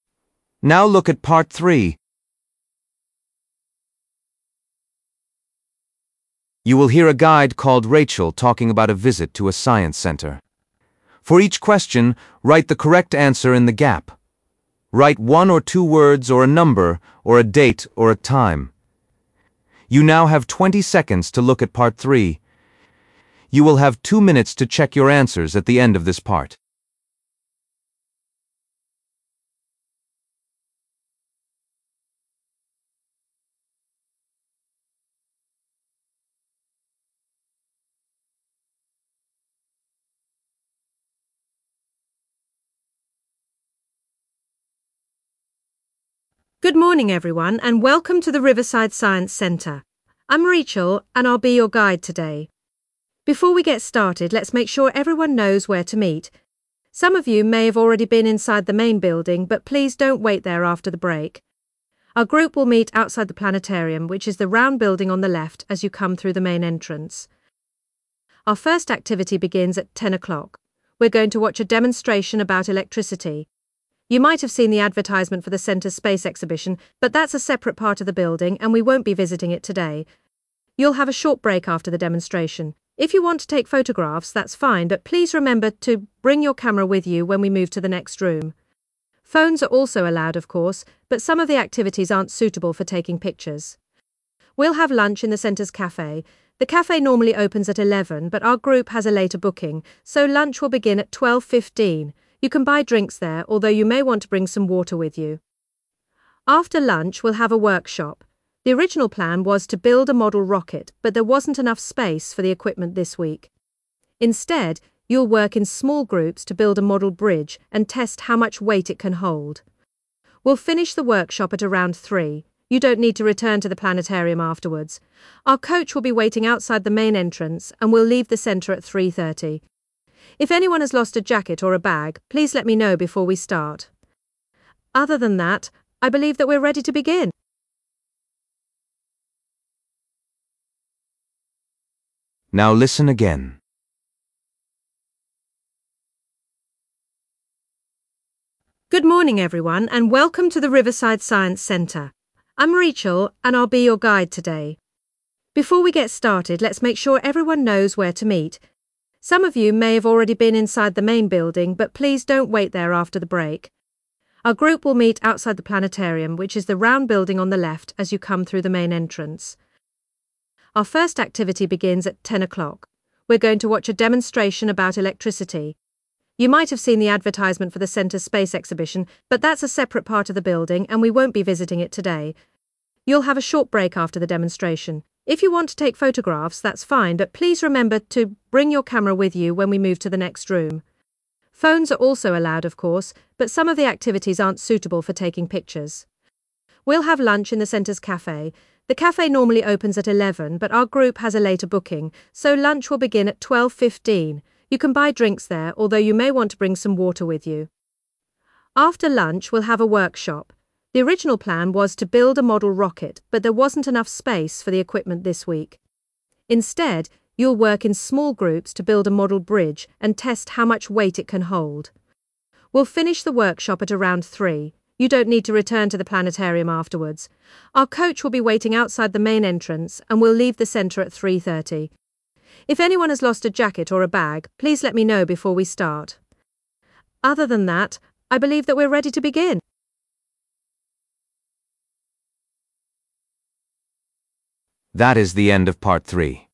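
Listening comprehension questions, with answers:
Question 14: Visitors will be meeting outside the 14 .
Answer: planetarium

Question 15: First activity of the day is a demonstration about 15 .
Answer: electricity

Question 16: Visitors are advised to bring a 16 along with their phones.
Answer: camera

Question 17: Lunch is scheduled to take place at 17 in a cafe.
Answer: 12:15

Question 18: One part of the visit is an afternoon workshop building a model 18 .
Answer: bridge

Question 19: Group will be leaving the centre at 19 .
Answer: 3:30

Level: B1 Preliminary (PET)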